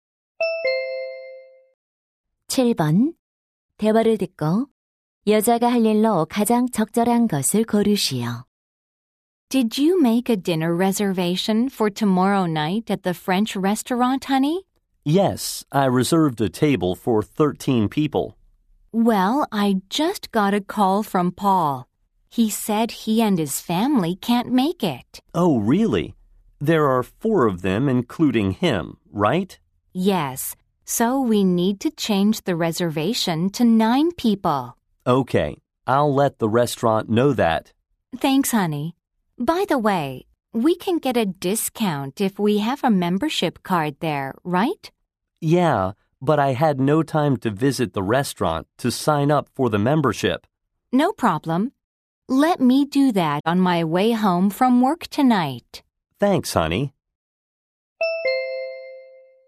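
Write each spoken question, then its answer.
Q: 대화를 듣고 여자가 할 일로 가장 적절한 것을 고르시오.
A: 식당 회원 가입하기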